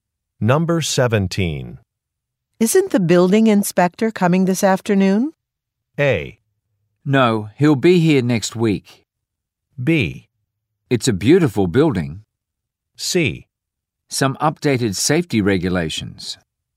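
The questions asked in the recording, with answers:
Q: Isn't the building inspector coming this afternoon?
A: A: No, he'll be here next week.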